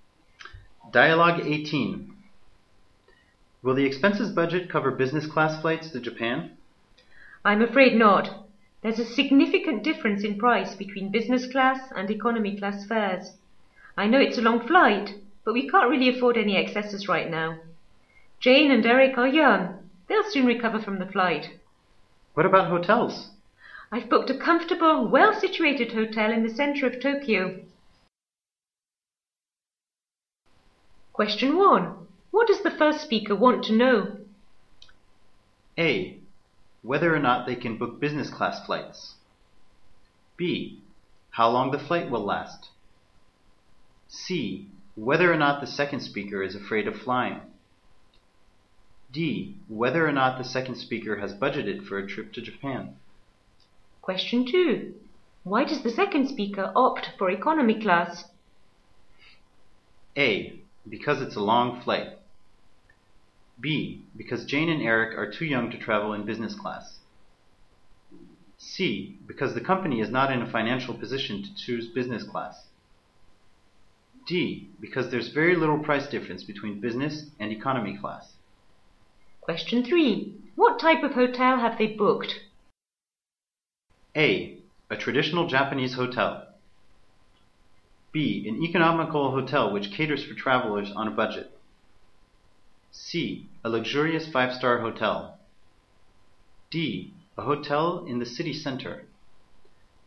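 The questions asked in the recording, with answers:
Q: What does the first speaker want to know?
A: A: Whether or not they can book business class flights.

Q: Why does the second speaker opt for economy class?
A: C: Because the company is not in a financial position to choose business class.

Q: What type of hotel have they booked?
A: D: A hotel in the city center.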